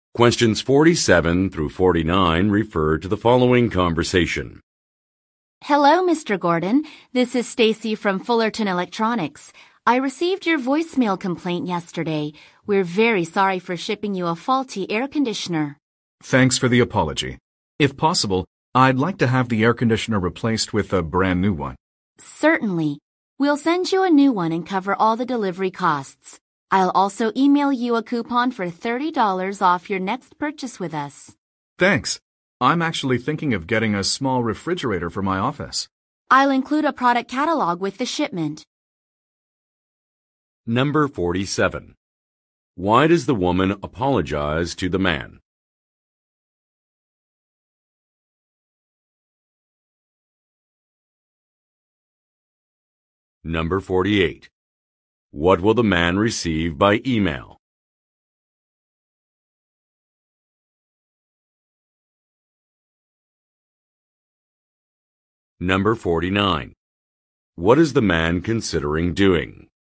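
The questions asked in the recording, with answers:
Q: Why does the woman apologize to the man?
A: A faulty air conditioner was shipped to him

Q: What will the man receive by email?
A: A $30 coupon for his next purchase

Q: What is the man considering doing?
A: Buying a small refrigerator for his office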